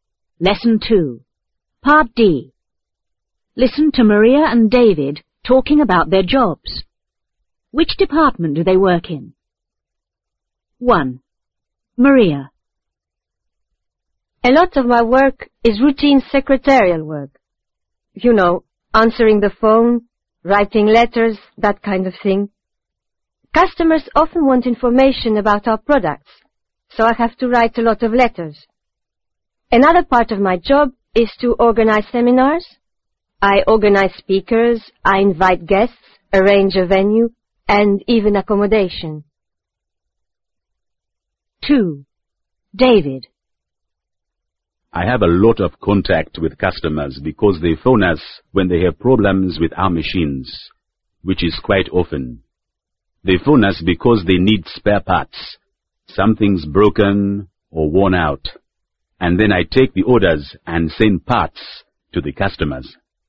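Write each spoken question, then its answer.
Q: Which department do they work in?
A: After sales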